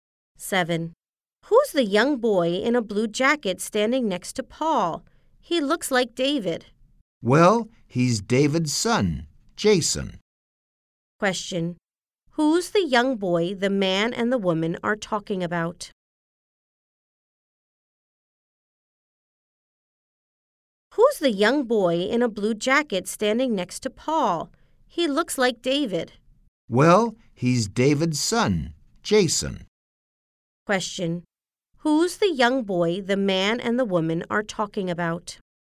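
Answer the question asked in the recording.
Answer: David's son, Jason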